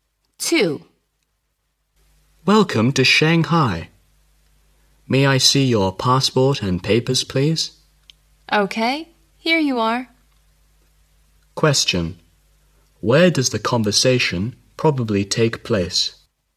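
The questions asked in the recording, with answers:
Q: Where does the conversation probably take place?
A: At passport control/customs (e.g. at the airport)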